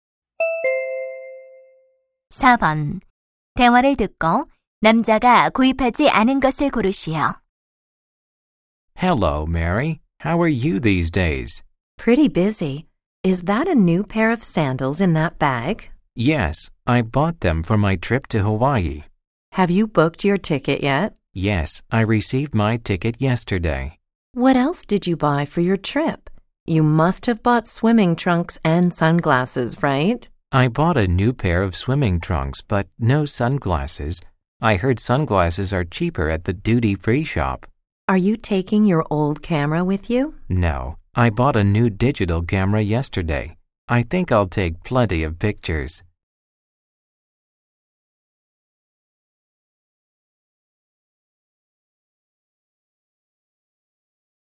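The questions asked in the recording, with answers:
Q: 대화를 듣고 남자가 구입하지 않은 것을 고르시오.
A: 선글라스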